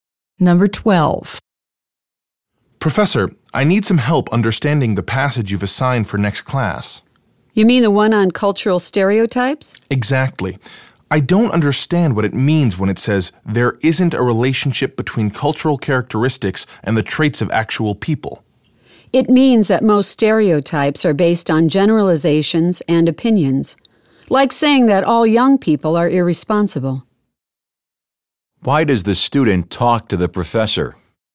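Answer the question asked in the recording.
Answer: To get help understanding an assigned passage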